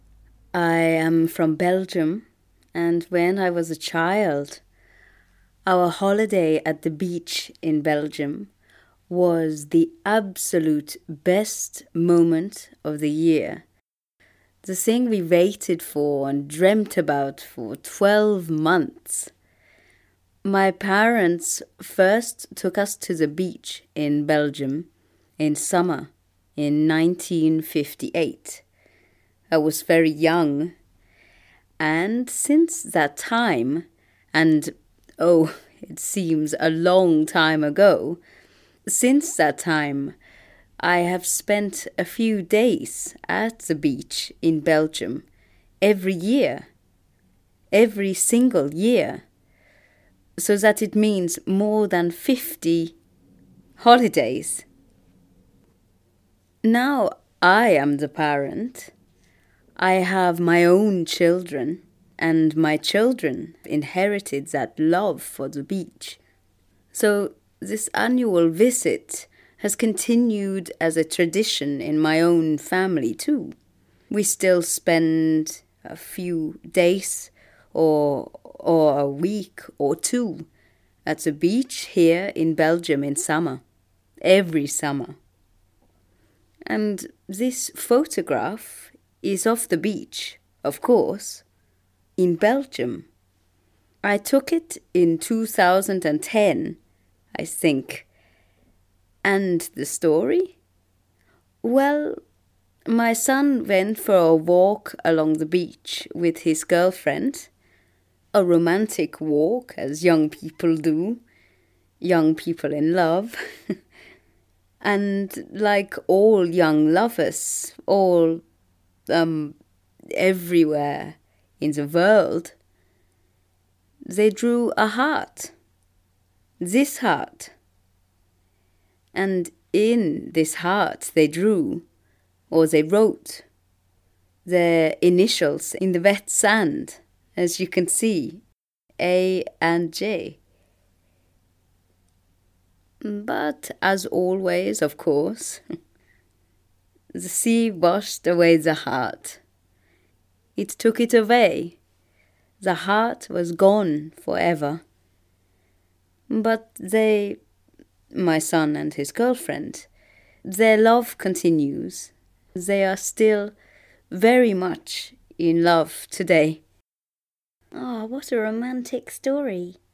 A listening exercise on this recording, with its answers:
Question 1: Where did the photographer go for her summer holiday when she was a child?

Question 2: Where does the photographer go now for her summer holiday?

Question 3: Who does she take with her on holiday?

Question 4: Who drew the heart in the sand?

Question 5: What has happened since the photographer took the photo?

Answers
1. A beach in Belgium
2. A beach in Belgium (she's been going to the same beach every year since she was a child)
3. She goes with her children
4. Her son and his girlfriend
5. Her son and his girlfriend are still together and in love.

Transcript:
I am from Belgium, and when I was a child, our holiday at the beach in Belgium was the absolute best moment of the year, the thing we waited for and dreamt about for twelve months.
My parents first took us to the beach in Belgium in summer in 1958. I was very young, and since that time, and oh, it seems a long time ago, since that time, I have spent a few days at the beach in Belgium every year, every single year, so that it means more than fifty holidays!
Now I am the parent, I have my own children, and my children inherited that love for the beach, so this annual visit has continued as a tradition in my own family too, we still spend a few days or or a week or two at the beach here in Belgium in summer. Every summer.
And this photograph is of the beach, of course, in Belgium. I took it in 2010, I think. And the story? Well, my son went for a walk along the beach with his girlfriend, a romantic walk as young people do, young people in love, and like all young lovers all, um, everywhere in the world, they drew a heart. This heart. And in this heart they drew – or they wrote - their initials in the wet sand, as you can see - A and J.
But, as always, of course, the sea washed away the heart. It took it away, the heart was gone forever. But they – my son and his girlfriend – their love continues. They are still very much in love today.
Ah, what a romantic story!

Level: A2 / B1